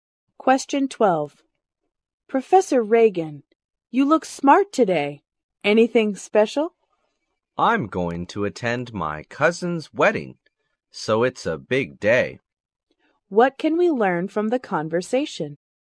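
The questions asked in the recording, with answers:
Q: What can we learn from the conversation?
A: The professor is going to his cousin's wedding.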